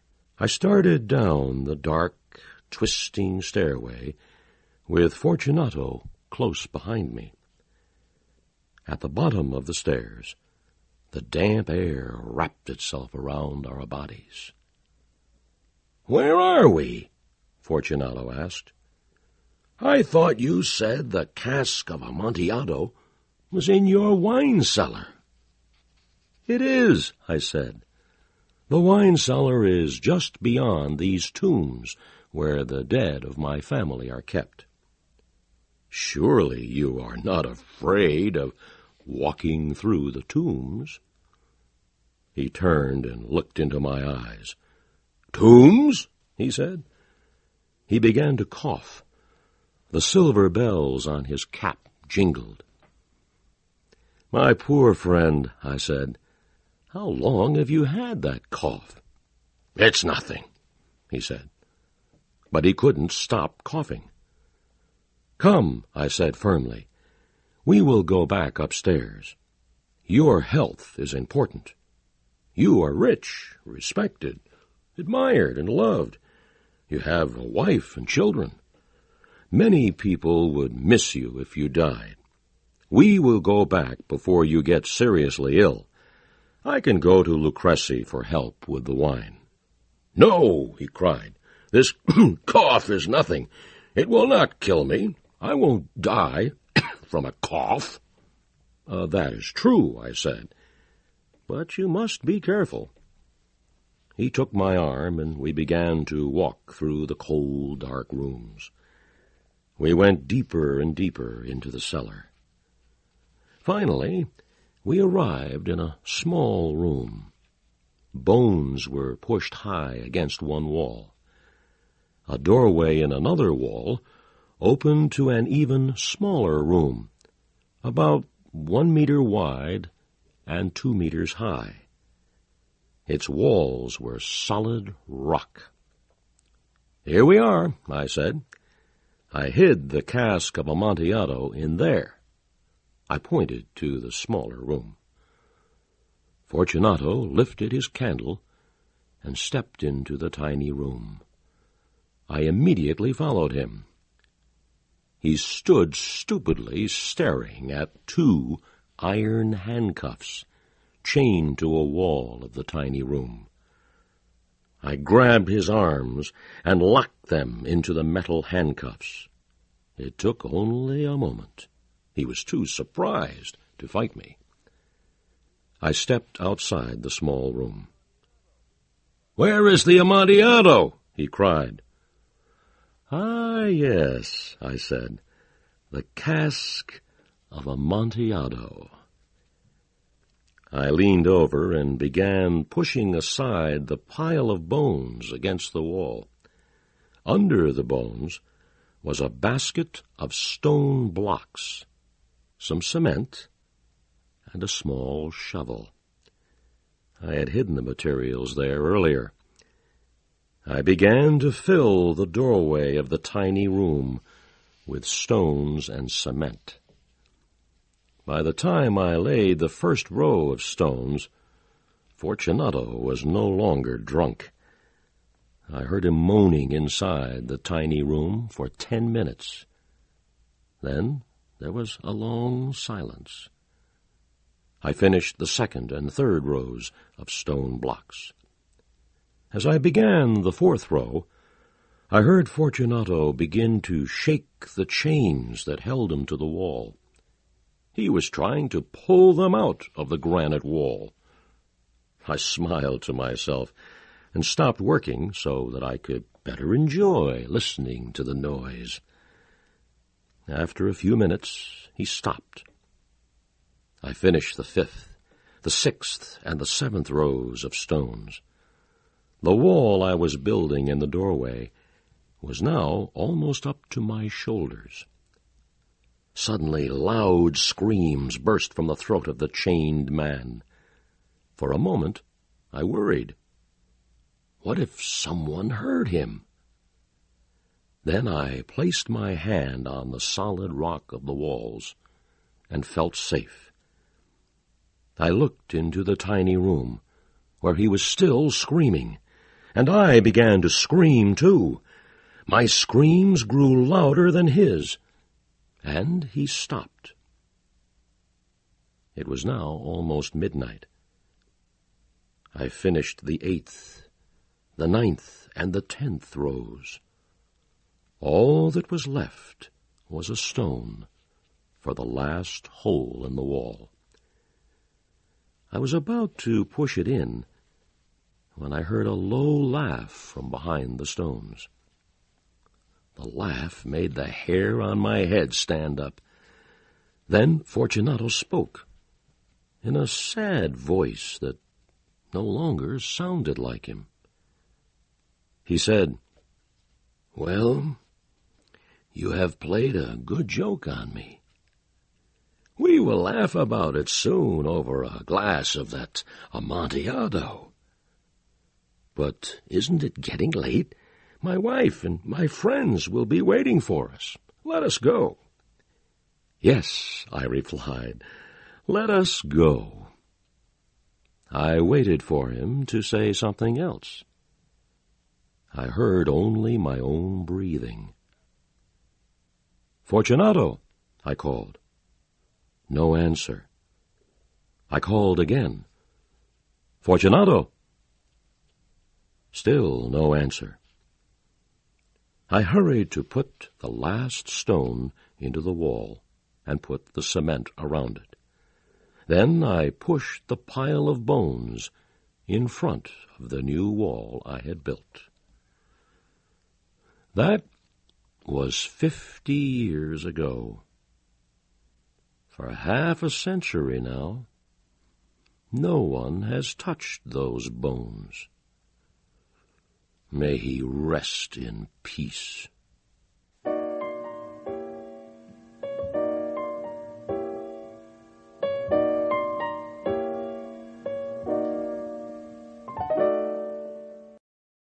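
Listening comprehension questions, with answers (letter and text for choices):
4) What does Fortunato encounter in the catacombs that should have alarmed him?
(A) Dead animals.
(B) Bones.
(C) A horrible stench.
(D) Chains on the walls.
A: (B) Bones.

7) Where does Montresor lead Fortunato finally?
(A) To the catacombs.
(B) To the dining room.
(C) To the bedroom.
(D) To the festival.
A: (A) To the catacombs.

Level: CAE - Certificate in Advanced English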